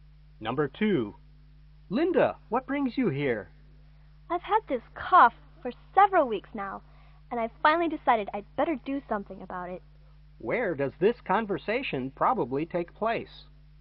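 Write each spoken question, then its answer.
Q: Where does this conversation probably take place?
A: At a doctor's office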